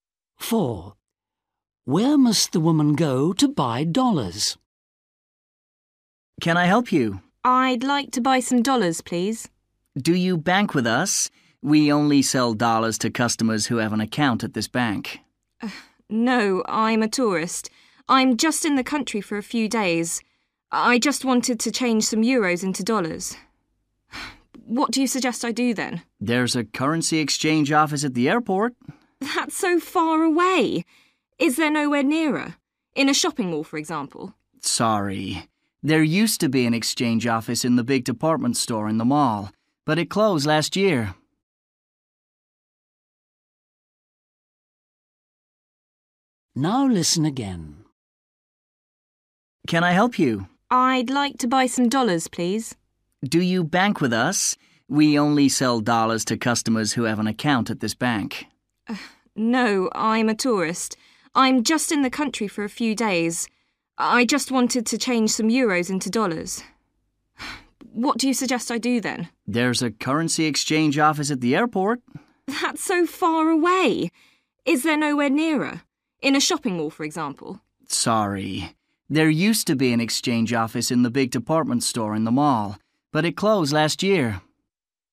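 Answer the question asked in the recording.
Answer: the currency exchange office at the airport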